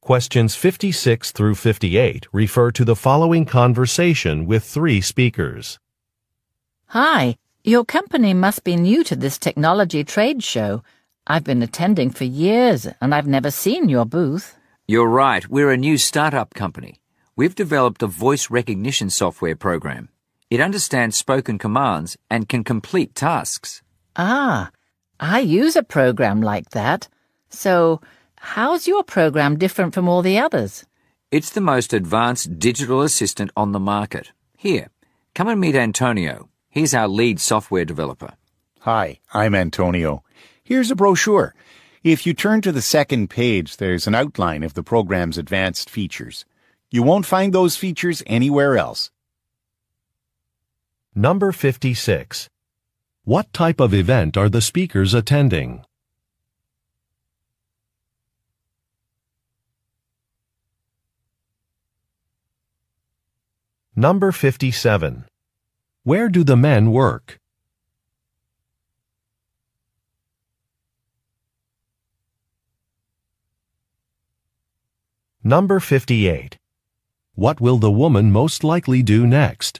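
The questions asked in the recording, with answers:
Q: What type of event are the speakers attending?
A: A technology trade show

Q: Where do the men work?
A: At a new startup software company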